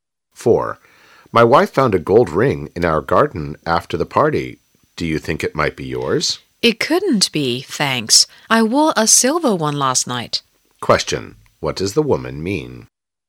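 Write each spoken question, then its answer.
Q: What does the woman mean?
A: The gold ring isn't hers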